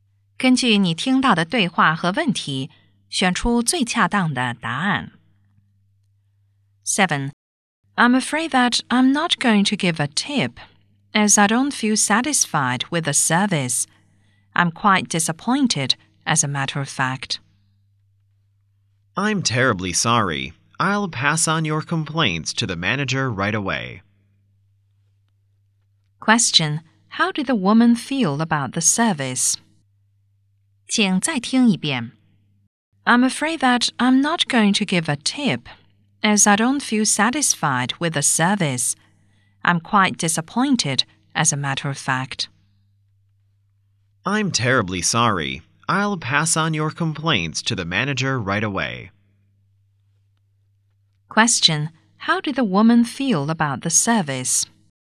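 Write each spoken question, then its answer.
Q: How did the woman feel about the service?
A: Disappointed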